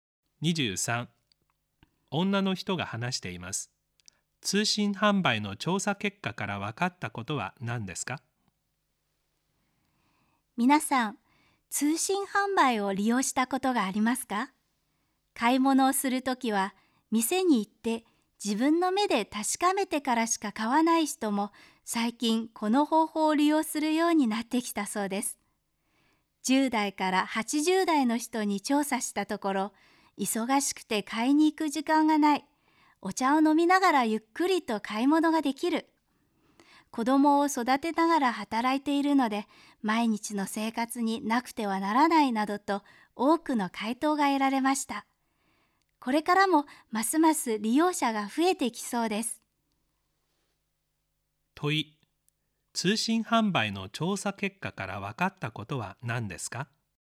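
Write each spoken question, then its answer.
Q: 問い、通信販売の調査結果から分かったことは何ですか?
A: 幅広い年代の人が便利さから利用するようになり、利用者が増えている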